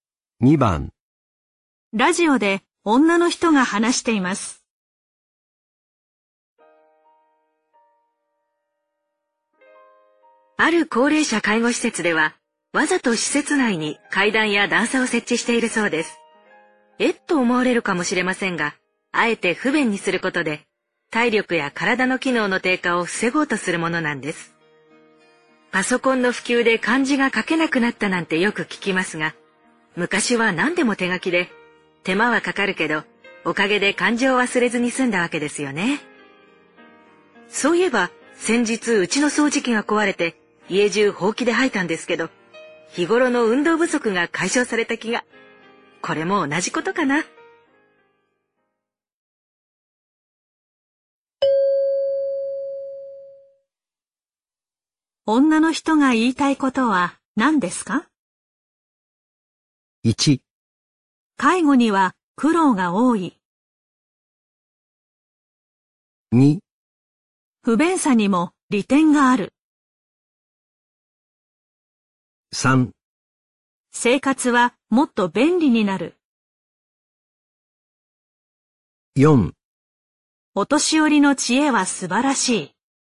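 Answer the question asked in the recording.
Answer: 2: 不便さにも利点がある。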